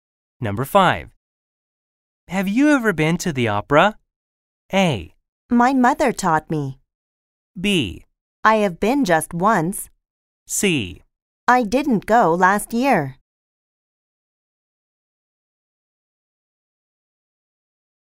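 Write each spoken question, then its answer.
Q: Have you ever been to the opera?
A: B: I have been just once.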